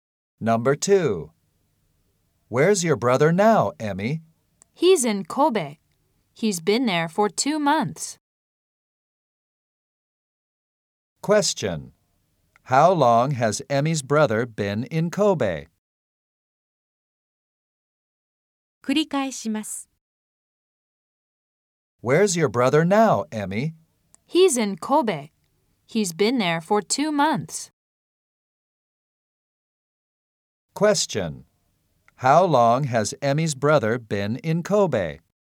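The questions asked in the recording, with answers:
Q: How long has Emmy's brother been in Kobe?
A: For two months.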